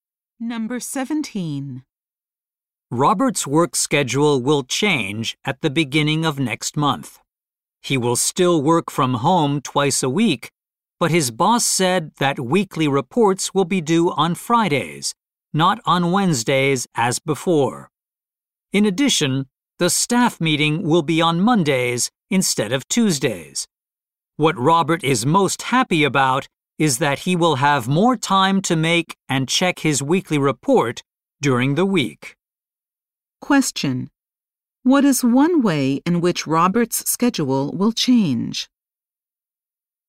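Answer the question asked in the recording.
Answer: Weekly reports will be due on Fridays instead of Wednesdays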